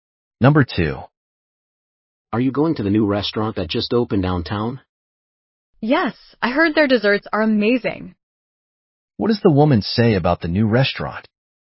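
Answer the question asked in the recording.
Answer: She heard their desserts are amazing.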